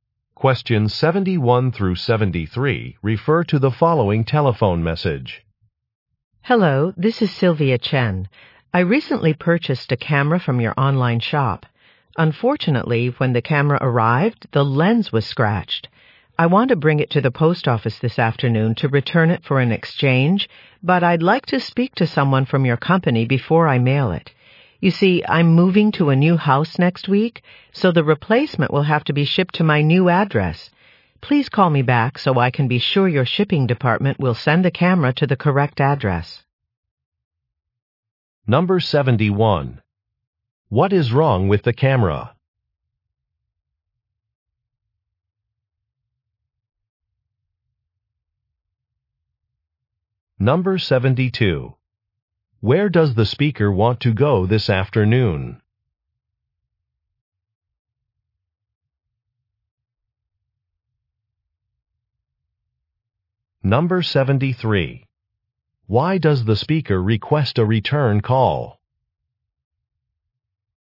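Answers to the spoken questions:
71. The lens was scratched.
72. To the post office.
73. To make sure the replacement is shipped to her new address.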